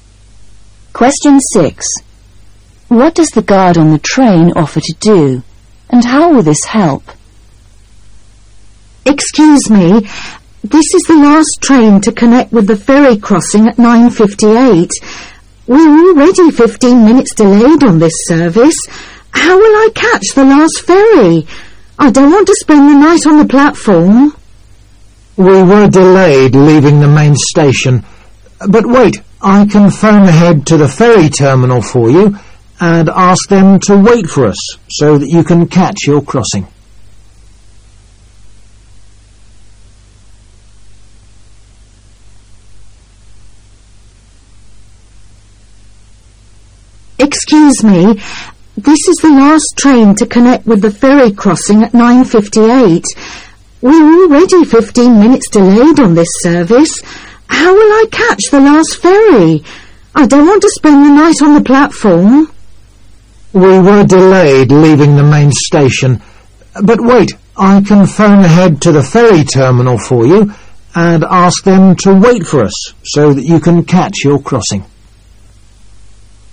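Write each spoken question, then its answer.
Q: What does the guard on the train offer to do, and how will this help?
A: Phone ahead to the ferry terminal to ask them to wait, so she can catch the crossing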